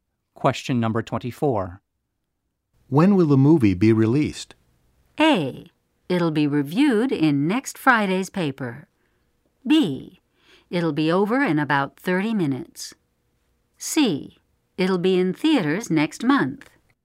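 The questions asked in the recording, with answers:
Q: When will the movie be released?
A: C: It'll be in theaters next month.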